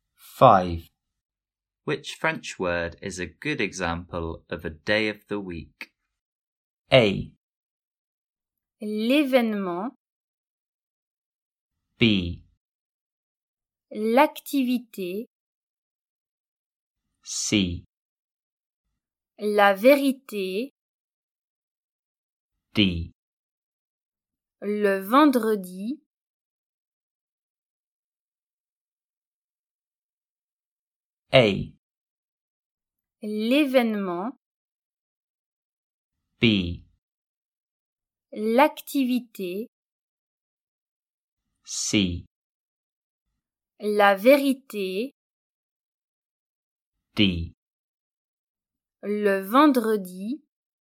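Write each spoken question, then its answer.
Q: Which French word is a good example of a day of the week?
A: D: Le vendredi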